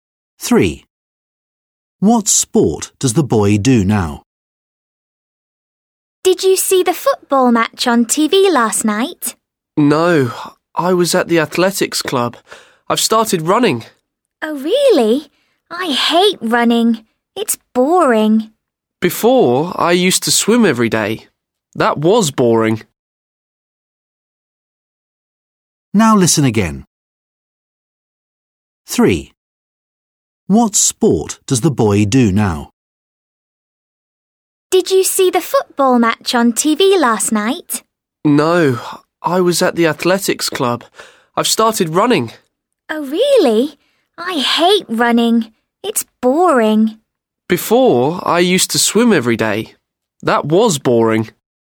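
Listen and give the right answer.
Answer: running (athletics)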